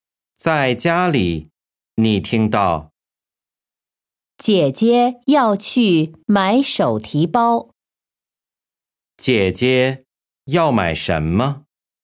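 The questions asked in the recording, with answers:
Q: 姐姐要买什么?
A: 手提包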